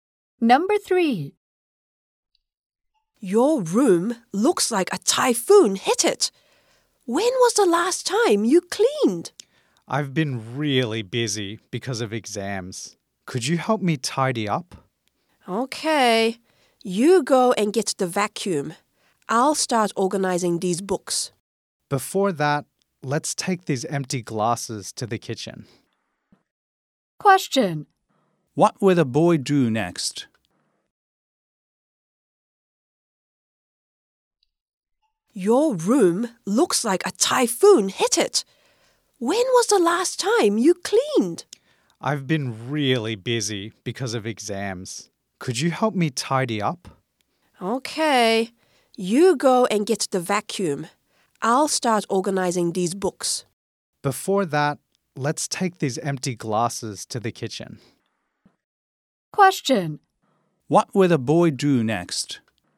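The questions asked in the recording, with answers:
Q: What will the boy do next?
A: Take the empty glasses to the kitchen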